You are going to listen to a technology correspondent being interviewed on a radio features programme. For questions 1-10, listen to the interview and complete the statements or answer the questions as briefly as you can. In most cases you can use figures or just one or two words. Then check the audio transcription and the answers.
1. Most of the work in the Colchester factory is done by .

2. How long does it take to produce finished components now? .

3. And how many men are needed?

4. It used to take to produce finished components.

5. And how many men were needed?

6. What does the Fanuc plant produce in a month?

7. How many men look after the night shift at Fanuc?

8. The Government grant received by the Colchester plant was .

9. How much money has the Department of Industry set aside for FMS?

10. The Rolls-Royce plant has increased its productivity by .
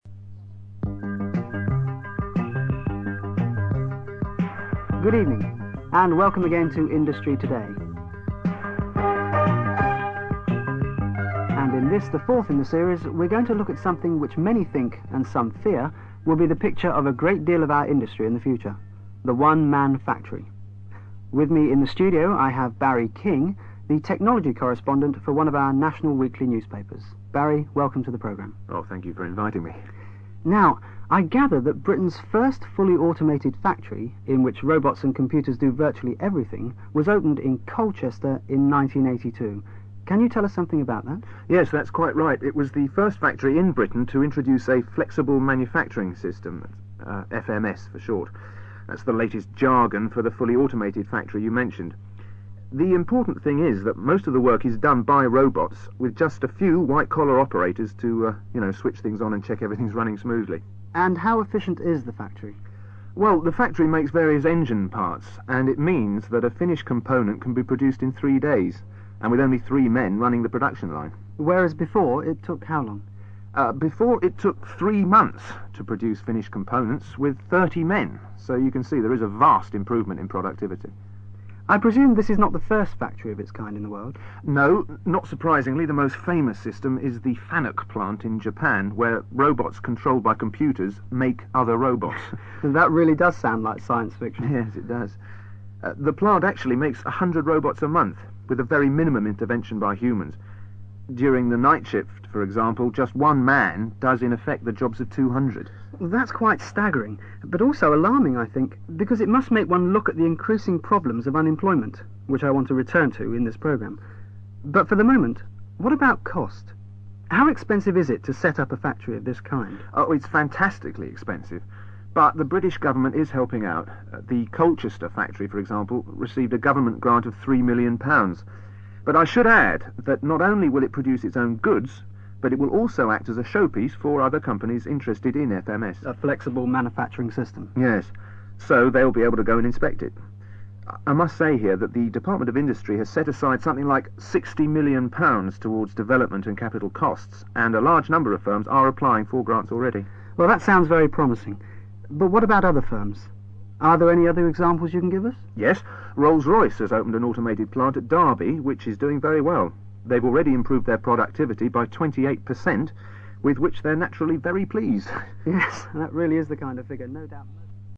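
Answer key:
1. robots
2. 3 days
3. three
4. 3 months
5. 30
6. 100 robots
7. one
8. £3 million
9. £60 million
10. 28%

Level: CPE Proficiency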